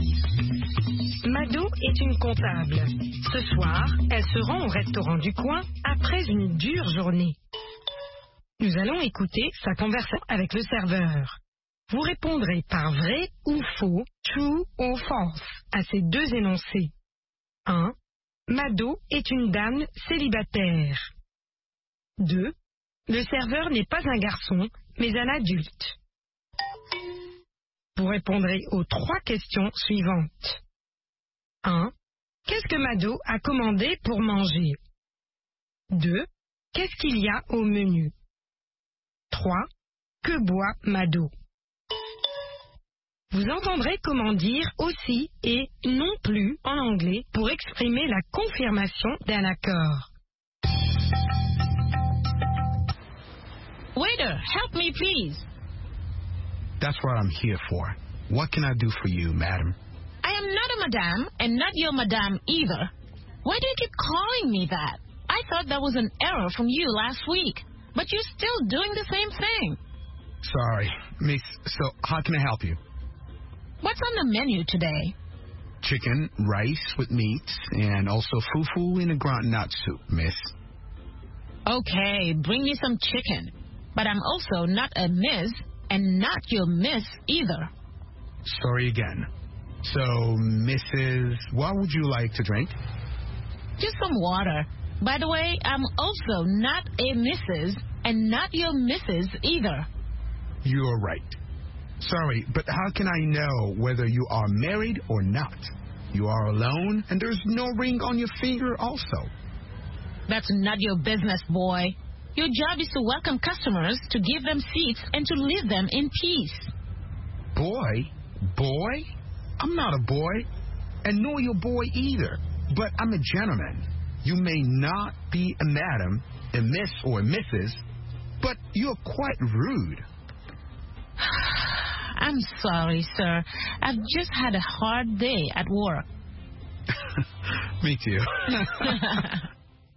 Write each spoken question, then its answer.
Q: Le serveur n'est pas un garçon, mais un adulte.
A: L'énoncé 2 est vrai. Le serveur n'est pas un garçon, mais un adulte.

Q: Qu'est-ce que Mado a commandé pour manger?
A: Elle a commandé du poulet.

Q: Qu'est-ce qu'il y a au menu?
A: Du poulet, du riz, de la viande et du foufou.

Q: Que boit Madou?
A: De l'eau.